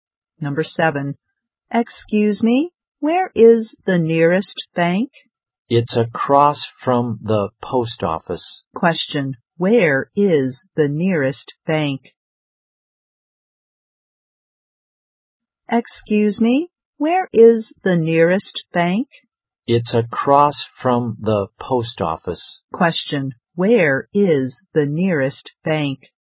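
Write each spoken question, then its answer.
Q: Where is the nearest bank?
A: Across from the post office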